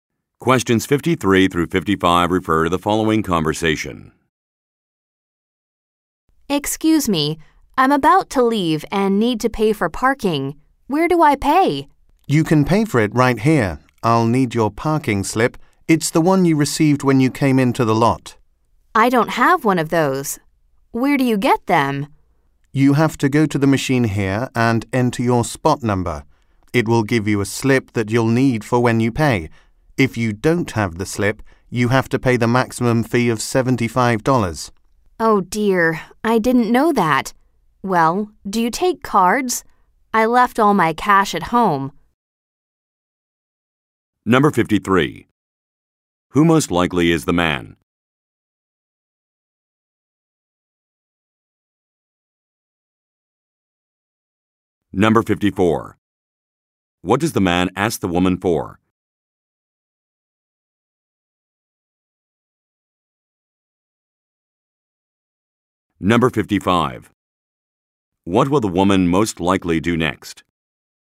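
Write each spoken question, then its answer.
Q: Who most likely is the man?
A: A parking lot attendant

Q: What does the man ask the woman for?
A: Her parking slip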